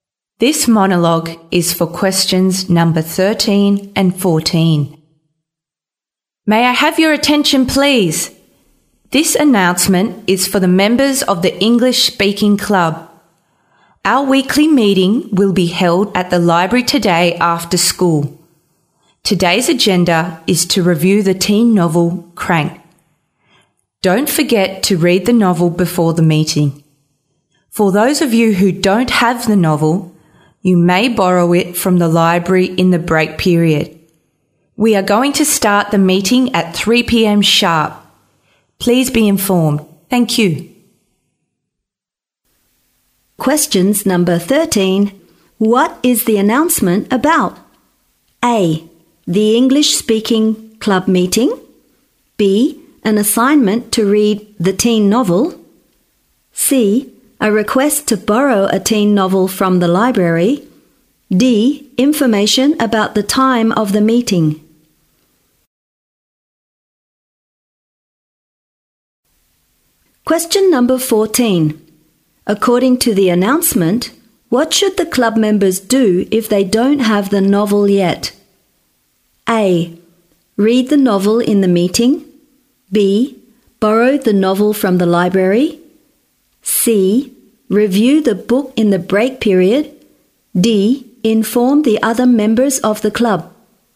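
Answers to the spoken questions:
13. A: The English Speaking Club meeting.
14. B: Borrow the novel from the library.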